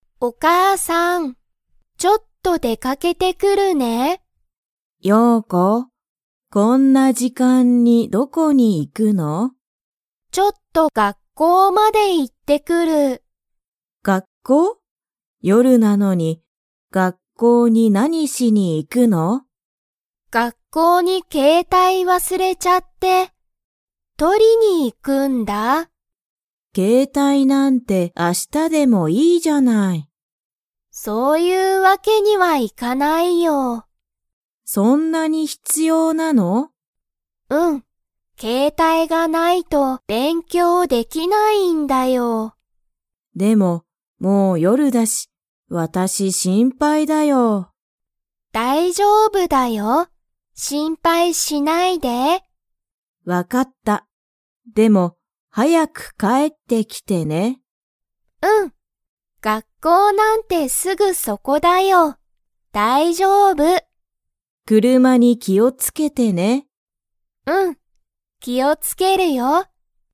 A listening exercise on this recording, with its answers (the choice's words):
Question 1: ヨウコは、学校がっこうに何なにを忘わすれましたか?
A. 時間じかん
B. ケータイ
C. 夜よる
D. 車くるま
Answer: ケータイ

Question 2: ユウコは、ケータイが 勉強べんきょうできない。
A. あると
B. ないと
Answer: ないと

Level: Level 3